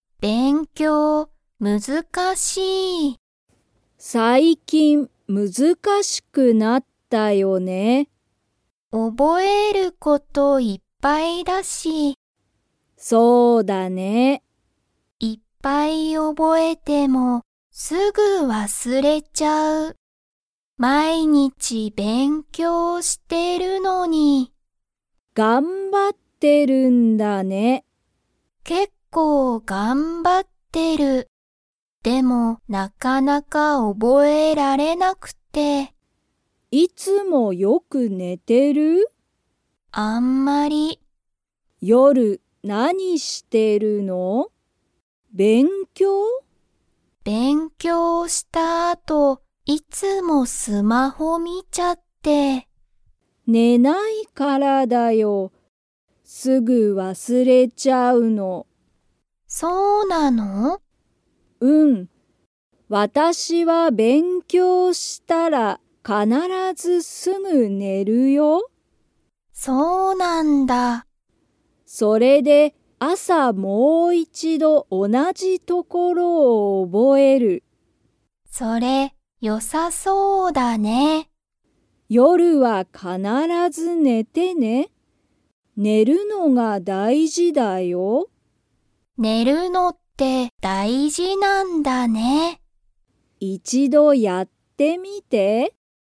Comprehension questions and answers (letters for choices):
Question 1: くみは、いつもよ)く寝(ね)ていますか?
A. はい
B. いいえ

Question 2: ゆりは、勉強(べんきょう)したら必(かなら)ず____。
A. すぐ寝(ね)る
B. スマホを見(み)る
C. 一度忘(いちどわす)れる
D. 毎日覚(まいにちおぼ)える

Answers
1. B
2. A

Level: Level 2